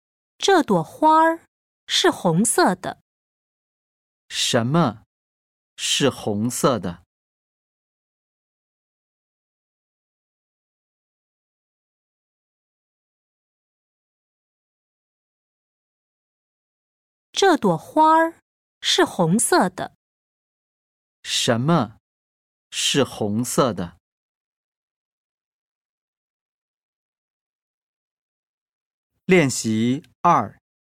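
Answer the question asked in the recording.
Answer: 这朵花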